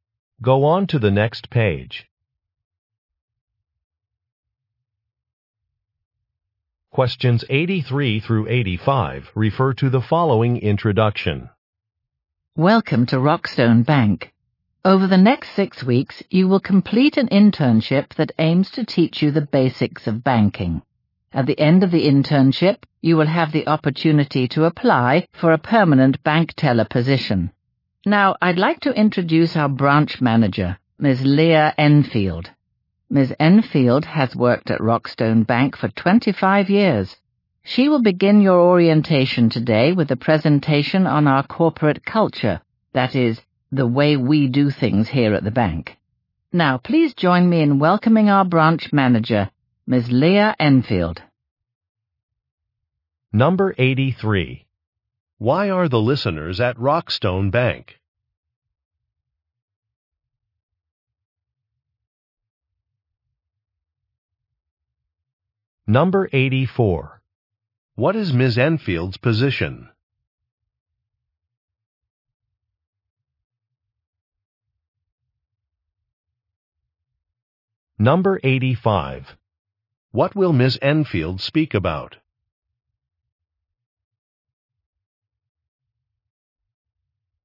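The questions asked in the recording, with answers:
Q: Why are the listeners at Rockstone Bank?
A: To do an internship

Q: What is Ms. Enfield's position?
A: Branch manager

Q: What will Ms. Enfield speak about?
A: Corporate culture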